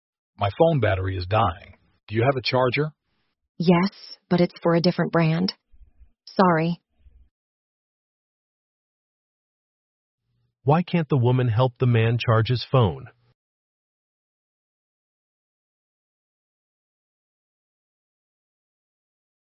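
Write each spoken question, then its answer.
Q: Why can't the woman help the man charge his phone?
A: Her charger is for a different brand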